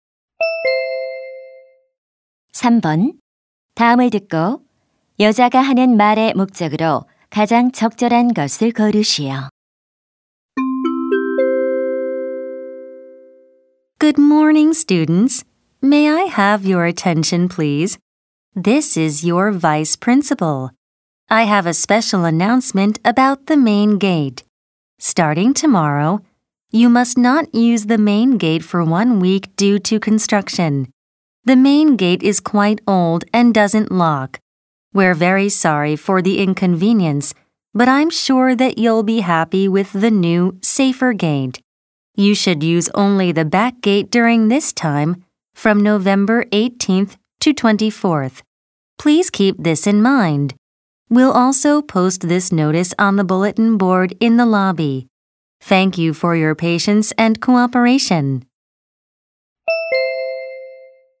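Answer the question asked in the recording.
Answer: 공사로 인해 일주일간 정문 사용이 금지됨을 알리려고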